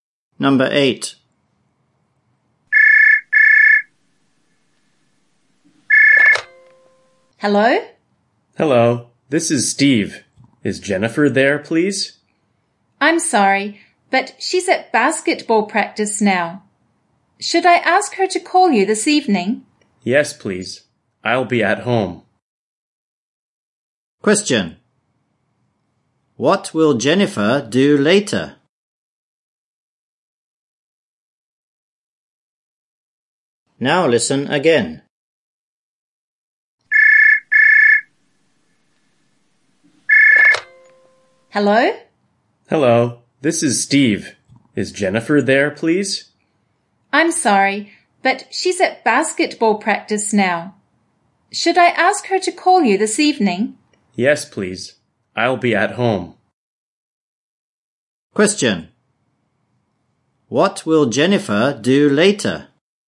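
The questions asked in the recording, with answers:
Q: What will Jennifer do later?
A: Call Steve this evening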